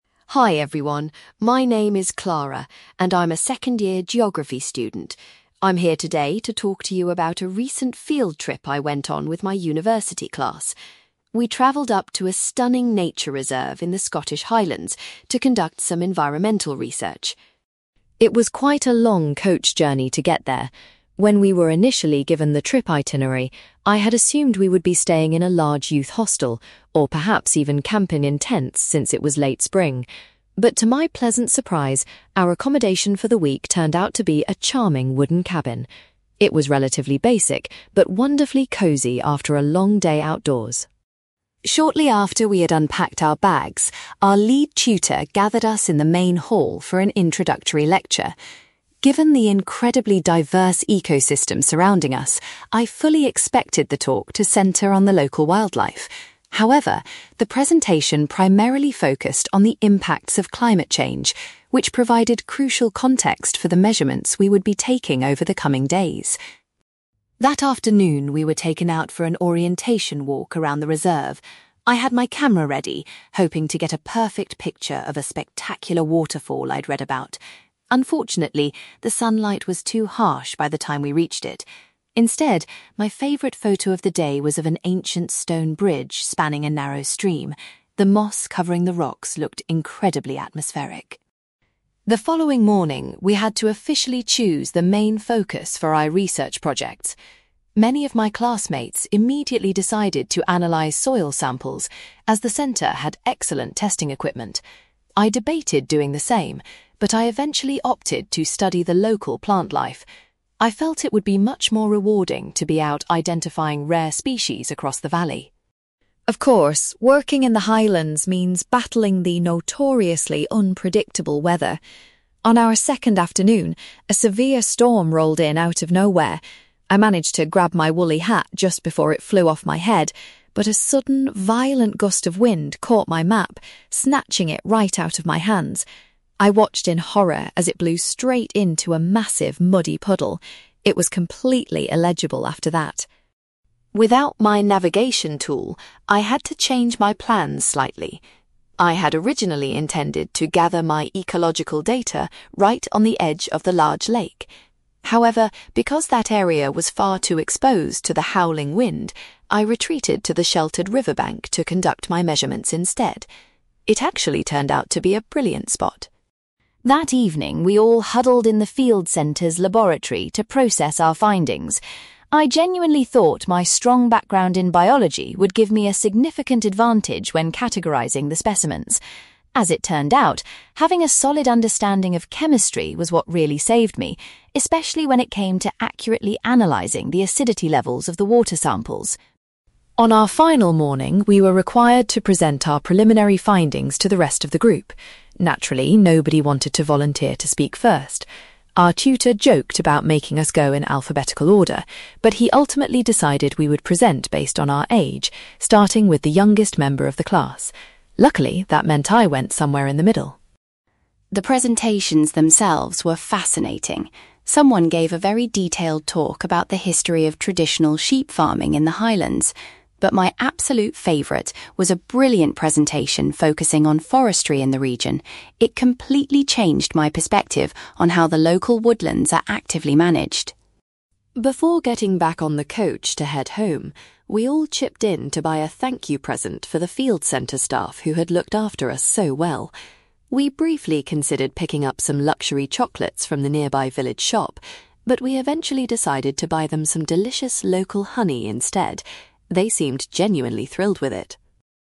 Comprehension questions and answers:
You will hear a university student called Clara giving a presentation about a geography field trip to the Scottish Highlands. For questions 9-18, complete the sentences with a word or short phrase.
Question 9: Clara was relieved to discover that she would be sleeping in a (9)........................... rather than a youth hostel or tent.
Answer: wooden cabin

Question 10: During the initial lecture, the tutor discussed (10)........................... instead of the animals living in the area.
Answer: climate change

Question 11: Clara's most successful photograph from her first walk featured a (11)........................... rather than a waterfall.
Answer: stone bridge

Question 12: For her primary research assignment, Clara chose to investigate the (12)........................... in the valley.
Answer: plant life

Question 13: Clara was frustrated when her (13)........................... blew into a muddy puddle during a severe storm.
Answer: map

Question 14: Because of the strong winds, Clara had to collect her data at a (14)........................... instead of by the lake.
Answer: river bank

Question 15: When analyzing her findings, Clara realised her knowledge of (15)........................... was highly beneficial.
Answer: chemistry

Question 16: The tutor decided to organize the students' presentations according to their (16)........................... .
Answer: age

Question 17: Clara was particularly impressed by a classmate's talk concerning local (17)........................... .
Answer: forestry

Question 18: The students decided to give the staff some (18)........................... as a departing gift.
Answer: local honey

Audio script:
Clara: Hi everyone, my name is Clara, and I'm a second-year geography student. I'm here today to talk to you about a recent field trip I went on with my university class. We travelled up to a stunning nature reserve in the Scottish Highlands to conduct some environmental research.
It was quite a long coach journey to get there. When we were initially given the trip itinerary, I had assumed we would be staying in a large youth hostel, or perhaps even camping in tents since it was late spring. But to my pleasant surprise, our accommodation for the week turned out to be a charming wooden cabin. It was relatively basic, but wonderfully cosy after a long day outdoors.
Shortly after we had unpacked our bags, our lead tutor gathered us in the main hall for an introductory lecture. Given the incredibly diverse ecosystem surrounding us, I fully expected the talk to centre on the local wildlife. However, the presentation primarily focused on the impacts of climate change, which provided crucial context for the measurements we would be taking over the coming days.
That afternoon, we were taken out for an orientation walk around the reserve. I had my camera ready, hoping to get a perfect picture of a spectacular waterfall I'd read about. Unfortunately, the sunlight was too harsh by the time we reached it. Instead, my favourite photo of the day was of an ancient stone bridge spanning a narrow stream. The moss covering the rocks looked incredibly atmospheric.
The following morning, we had to officially choose the main focus for our research projects. Many of my classmates immediately decided to analyze soil samples, as the centre had excellent testing equipment. I debated doing the same, but I eventually opted to study the local plant life. I felt it would be much more rewarding to be out identifying rare species across the valley.
Of course, working in the Highlands means battling the notoriously unpredictable weather. On our second afternoon, a severe storm rolled in out of nowhere. I managed to grab my woolly hat just before it flew off my head, but a sudden, violent gust of wind caught my map, snatching it right out of my hands. I watched in horror as it blew straight into a massive, muddy puddle. It was completely illegible after that!
Without my navigation tool, I had to change my plans slightly. I had originally intended to gather my ecological data right on the edge of the large lake. However, because that area was far too exposed to the howling wind, I retreated to the sheltered river bank to conduct my measurements instead. It actually turned out to be a brilliant spot.
That evening, we all huddled in the field centre's laboratory to process our findings. I genuinely thought my strong background in biology would give me a significant advantage when categorising the specimens. As it turned out, having a solid understanding of chemistry was what really saved me, especially when it came to accurately analyzing the acidity levels of the water samples.
On our final morning, we were required to present our preliminary findings to the rest of the group. Naturally, nobody wanted to volunteer to speak first. Our tutor joked about making us go in alphabetical order, but he ultimately decided we would present based on our age, starting with the youngest member of the class. Luckily, that meant I went somewhere in the middle!
The presentations themselves were fascinating. Someone gave a very detailed talk about the history of traditional sheep farming in the highlands. But my absolute favourite was a brilliant presentation focusing on forestry in the region. It completely changed my perspective on how the local woodlands are actively managed.
Before getting back on the coach to head home, we all chipped in to buy a thank-you present for the field centre staff who had looked after us so well. We briefly considered picking up some luxury chocolates from the nearby village shop, but we eventually decided to buy them some delicious local honey instead. They seemed genuinely thrilled with it.

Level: B2